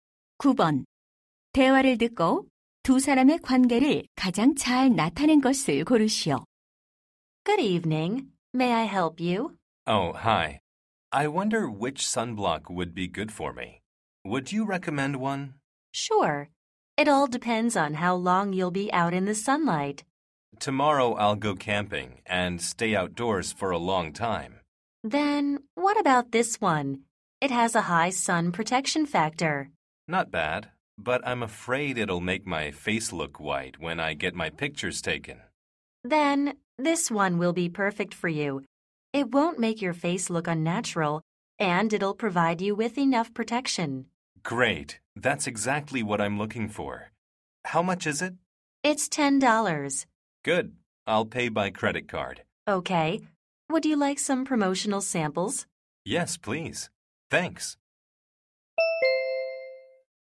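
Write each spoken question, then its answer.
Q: 대화를 듣고 두 사람의 관계를 가장 잘 나타낸 것을 고르시오.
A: 화장품 가게 점원과 손님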